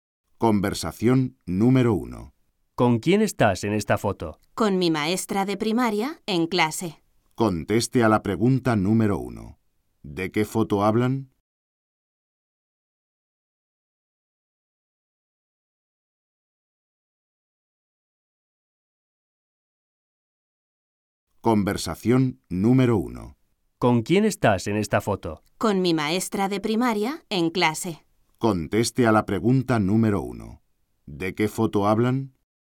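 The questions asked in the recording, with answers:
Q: ¿De qué foto hablan?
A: Una foto con su maestra de primaria en clase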